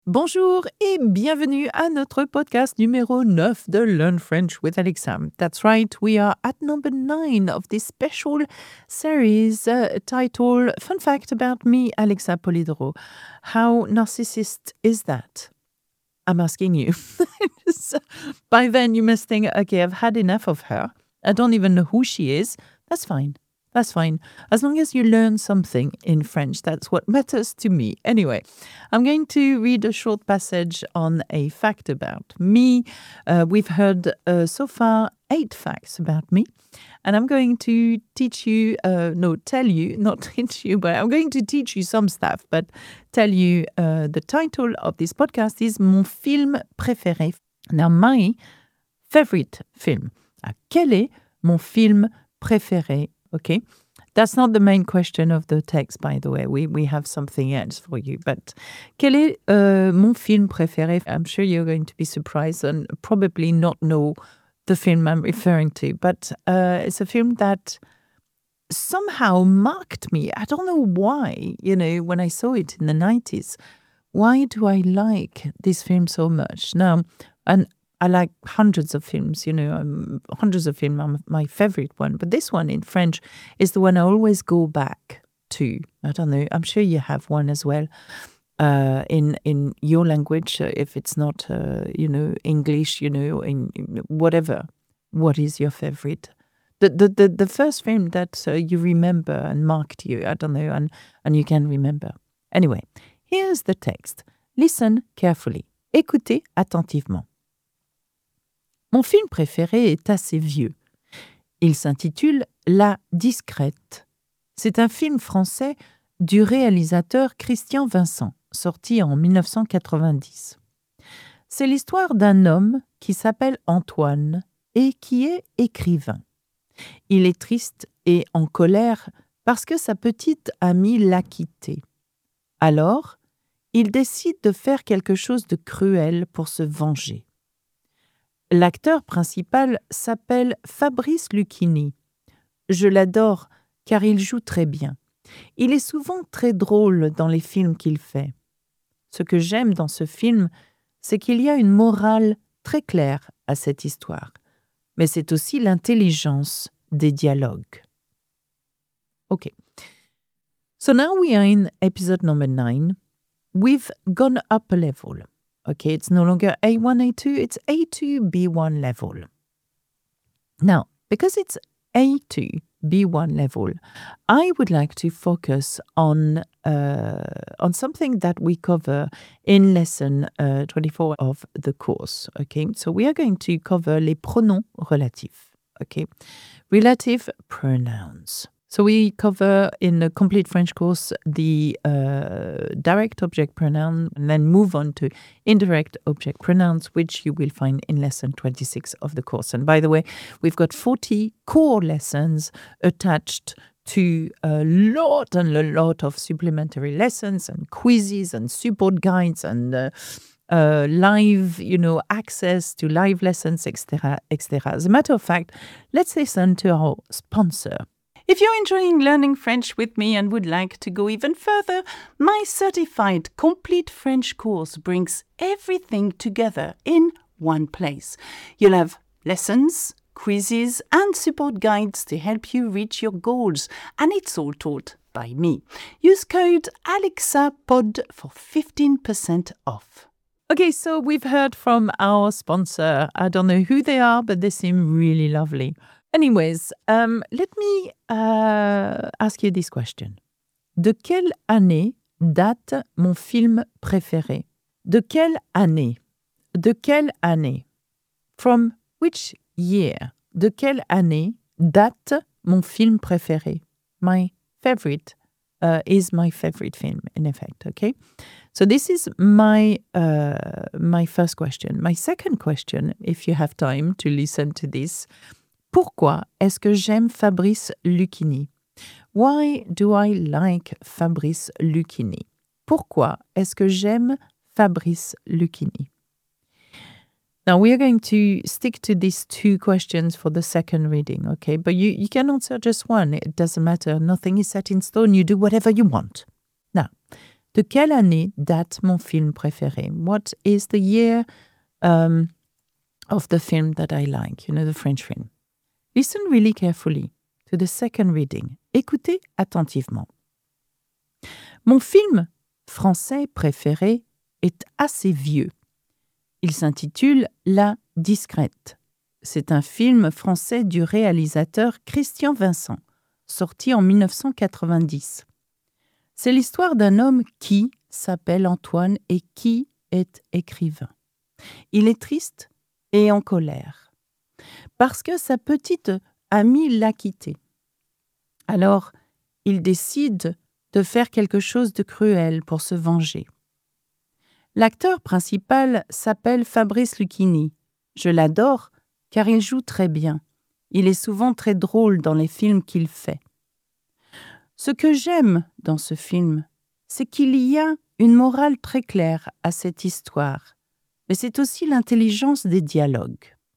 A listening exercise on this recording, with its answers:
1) De quelle année date mon film préféré ?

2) Pourquoi est-ce que j'aime Fabrice Luchini ?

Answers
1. Mon film préféré date de 1990.
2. J'aime Fabrice Luchini car il joue très bien et il est souvent drôle.

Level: A2 - niveau usuel (elementary)